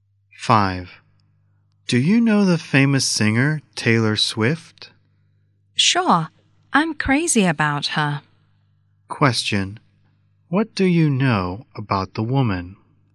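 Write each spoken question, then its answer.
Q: What do you know about the woman?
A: She is crazy about Taylor Swift.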